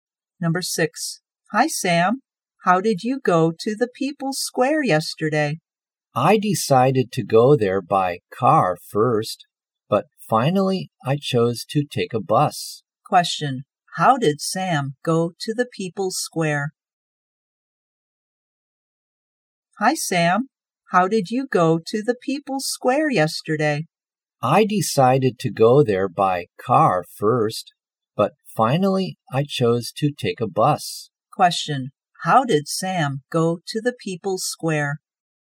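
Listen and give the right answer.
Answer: by bus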